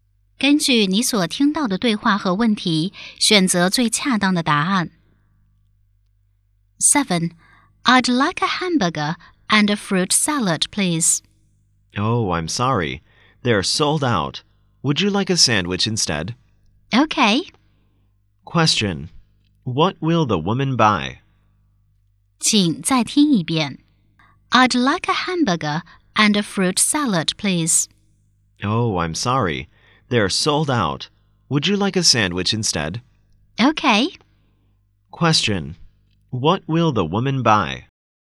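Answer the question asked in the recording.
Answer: A sandwich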